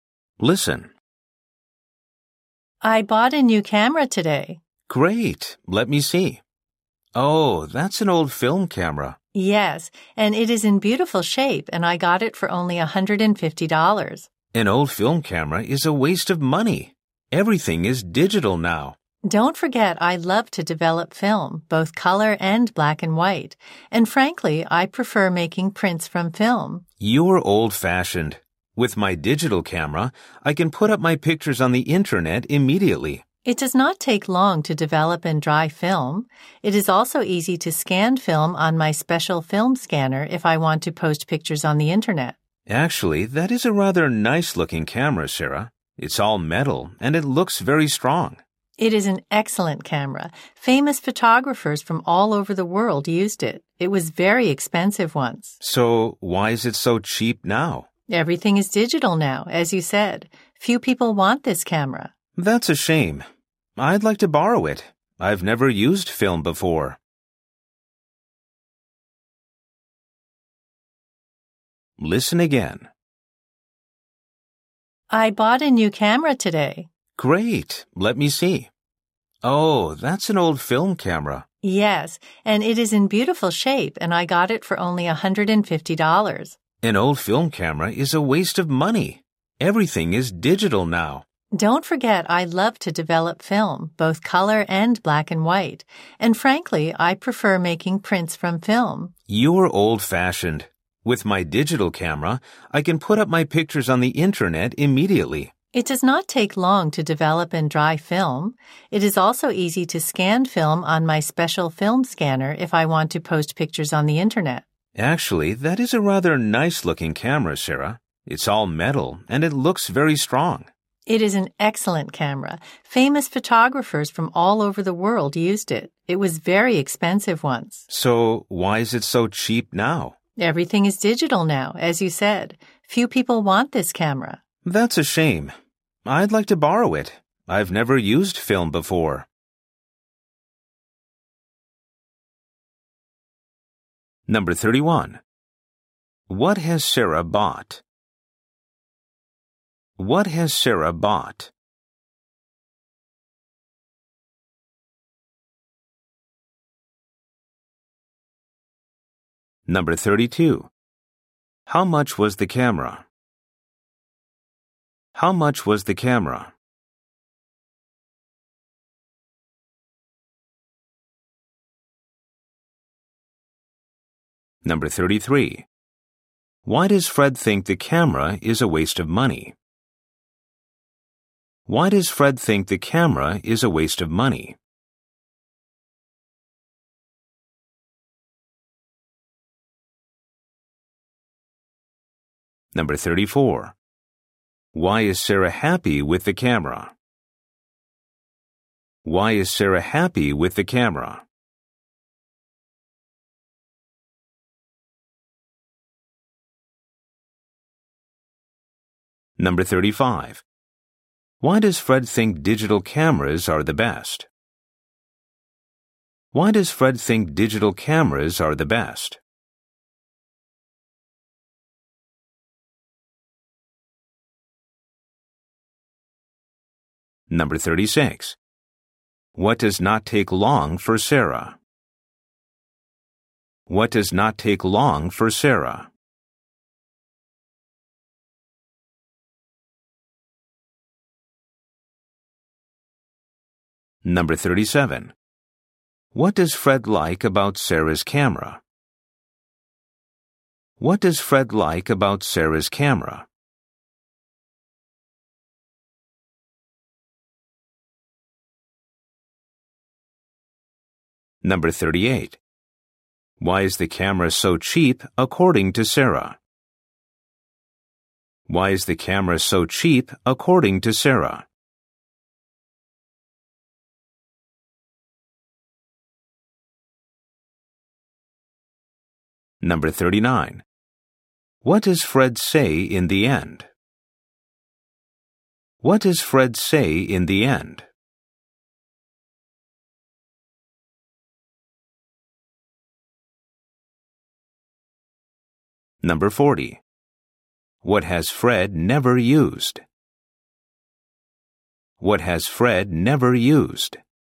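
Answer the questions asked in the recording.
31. An old film camera
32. $150
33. Everything is digital now
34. She loves developing film and prefers making prints from film
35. He can put pictures on the internet immediately
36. Developing and drying film
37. It's all metal and looks very strong
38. Everything is digital, so few people want it
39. He'd like to borrow the camera
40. Film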